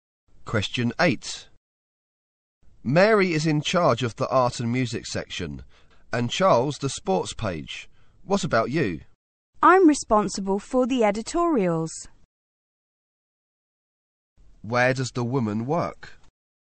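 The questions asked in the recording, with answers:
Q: Where does the woman work?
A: At a newspaper.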